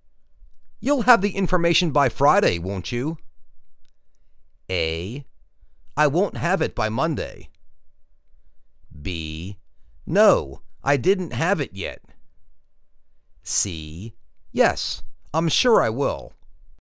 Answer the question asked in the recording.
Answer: Yes, I'm sure I will.